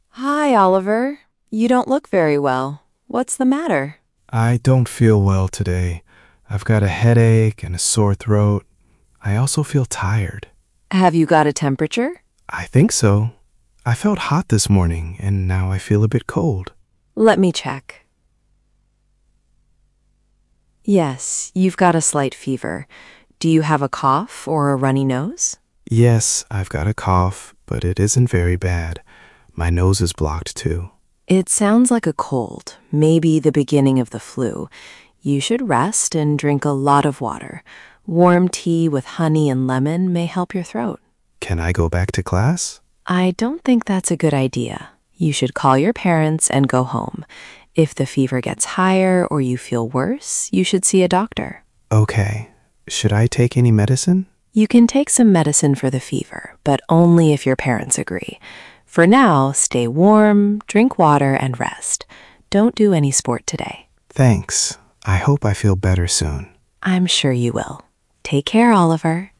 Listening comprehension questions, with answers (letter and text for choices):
Przeczytaj pytania, a potem posłuchaj i wybierz właściwą odpowiedź.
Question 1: Where is Oliver?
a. at the dentist's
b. at the school nurse's office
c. at a sports club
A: b. at the school nurse's office

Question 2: What is probably wrong with Oliver?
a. He has a cold or the beginning of the flu.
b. He has a broken arm.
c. He has a stomach ache.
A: a. He has a cold or the beginning of the flu.

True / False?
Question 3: Oliver feels tired.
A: True

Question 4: He has a very bad cough.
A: False

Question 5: The nurse thinks he should go back to class.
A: False

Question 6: The nurse says warm tea with honey and lemon may help his throat.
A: True

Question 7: Oliver should do sport today.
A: False

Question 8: Oliver should see a doctor if he feels worse.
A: True

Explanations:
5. she says it's not a good idea.
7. the nurse says don't do any sport today.

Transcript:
Nurse: Hi, Oliver. You don't look very well. What's the matter?
Oliver: I don't feel well today. I've got a headache and a sore throat. I also feel tired.
Nurse: Have you got a temperature?
Oliver: I think so. I felt hot this morning, and now I feel a bit cold.
Nurse: Let me check. Yes, you've got a slight fever. Do you have a cough or a runny nose?
Oliver: Yes, I've got a cough, but it isn't very bad. My nose is blocked too.
Nurse: It sounds like a cold, maybe the beginning of the flu. You should rest and drink a lot of water. Warm tea with honey and lemon may help your throat.
Oliver: Can I go back to class?
Nurse: I don't think that's a good idea. You should call your parents and go home. If the fever gets higher or you feel worse, you should see a doctor.
Oliver: Okay. Should I take any medicine?
Nurse: You can take some medicine for the fever, but only if your parents agree. For now, stay warm, drink water and rest. Don't do any sport today.
Oliver: Thanks. I hope I feel better soon.
Nurse: I'm sure you will. Take care, Oliver.

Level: A2+/B1